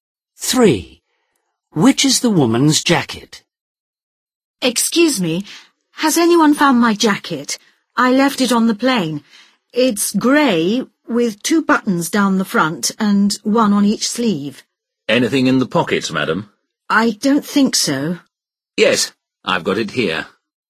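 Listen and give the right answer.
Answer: The grey one with 2 buttons down the front and 1 on each sleeve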